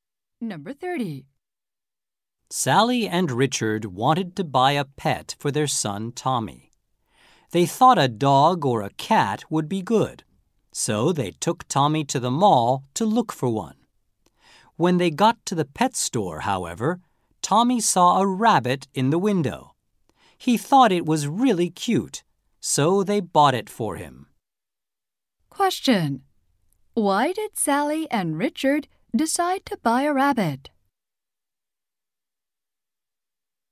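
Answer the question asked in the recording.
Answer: Tommy thought it was really cute.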